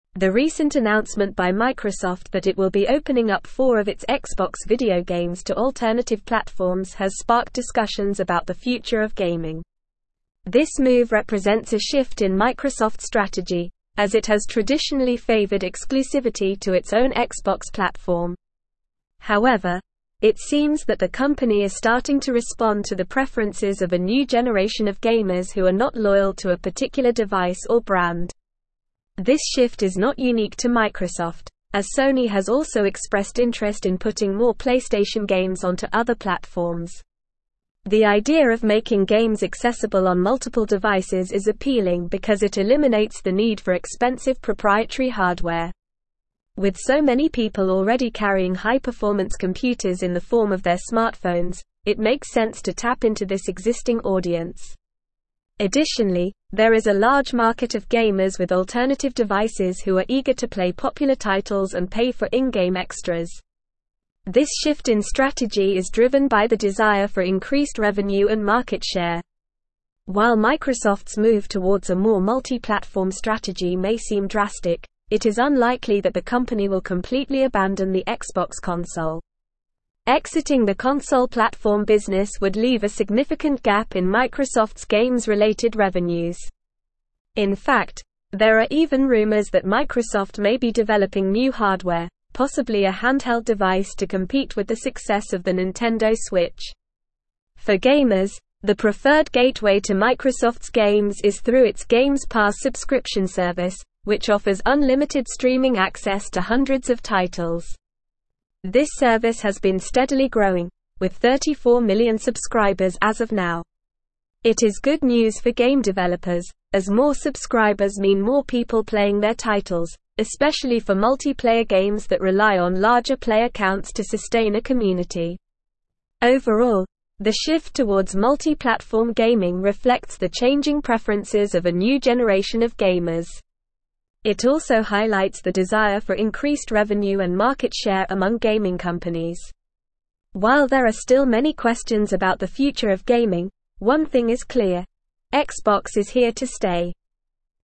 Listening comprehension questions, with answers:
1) The recent (1)______ by Microsoft that it will be opening up four of its Xbox video games to alternative platforms has sparked discussions about the future of gaming.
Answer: announcement

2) This move represents a shift in Microsoft's strategy, as it has traditionally favored (2)______ to its own Xbox platform.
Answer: exclusivity

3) However, it seems that the company is starting to respond to the preferences of a new generation of (3)______ who are not loyal to a particular device or brand.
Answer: gamers

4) This shift is not (4)______ to Microsoft, as Sony has also expressed interest in putting more PlayStation games onto other (5)______.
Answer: unique

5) This shift is not (4)______ to Microsoft, as Sony has also expressed interest in putting more PlayStation games onto other (5)______.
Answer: platforms

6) The idea of (6)______ games accessible on multiple devices is appealing because it eliminates the need for (7)______ proprietary (8)______.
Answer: making

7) The idea of (6)______ games accessible on multiple devices is appealing because it eliminates the need for (7)______ proprietary (8)______.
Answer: expensive

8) The idea of (6)______ games accessible on multiple devices is appealing because it eliminates the need for (7)______ proprietary (8)______.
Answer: hardware

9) (9)______ the console platform (10)______ would (11)______ a significant gap in Microsoft's games-related revenues.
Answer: Exiting

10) (9)______ the console platform (10)______ would (11)______ a significant gap in Microsoft's games-related revenues.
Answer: business

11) (9)______ the console platform (10)______ would (11)______ a significant gap in Microsoft's games-related revenues.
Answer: leave

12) In fact, there are even rumors that Microsoft may be developing new hardware, possibly a handheld device to compete with the success of the (12)______ Switch.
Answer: Nintendo

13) It is good news for game developers, as more subscribers mean more (13)______ playing their titles, especially for multiplayer (14)______ that rely on larger player counts to (15)______ a (16)______.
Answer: people

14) It is good news for game developers, as more subscribers mean more (13)______ playing their titles, especially for multiplayer (14)______ that rely on larger player counts to (15)______ a (16)______.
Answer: games

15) It is good news for game developers, as more subscribers mean more (13)______ playing their titles, especially for multiplayer (14)______ that rely on larger player counts to (15)______ a (16)______.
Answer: sustain

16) It is good news for game developers, as more subscribers mean more (13)______ playing their titles, especially for multiplayer (14)______ that rely on larger player counts to (15)______ a (16)______.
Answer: community

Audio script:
The recent announcement by Microsoft that it will be opening up four of its Xbox video games to alternative platforms has sparked discussions about the future of gaming. This move represents a shift in Microsoft's strategy, as it has traditionally favored exclusivity to its own Xbox platform. However, it seems that the company is starting to respond to the preferences of a new generation of gamers who are not loyal to a particular device or brand. This shift is not unique to Microsoft, as Sony has also expressed interest in putting more PlayStation games onto other platforms.
The idea of making games accessible on multiple devices is appealing because it eliminates the need for expensive proprietary hardware. With so many people already carrying high-performance computers in the form of their smartphones, it makes sense to tap into this existing audience. Additionally, there is a large market of gamers with alternative devices who are eager to play popular titles and pay for in-game extras. This shift in strategy is driven by the desire for increased revenue and market share.
While Microsoft's move towards a more multi-platform strategy may seem drastic, it is unlikely that the company will completely abandon the Xbox console. Exiting the console platform business would leave a significant gap in Microsoft's games-related revenues. In fact, there are even rumors that Microsoft may be developing new hardware, possibly a handheld device to compete with the success of the Nintendo Switch.
For gamers, the preferred gateway to Microsoft's games is through its Games Pass subscription service, which offers unlimited streaming access to hundreds of titles. This service has been steadily growing, with 34 million subscribers as of now. It is good news for game developers, as more subscribers mean more people playing their titles, especially for multiplayer games that rely on larger player counts to sustain a community.
Overall, the shift towards multi-platform gaming reflects the changing preferences of a new generation of gamers. While there are still many questions about the future of gaming, one thing is clear: Xbox is here to stay.

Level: Level 4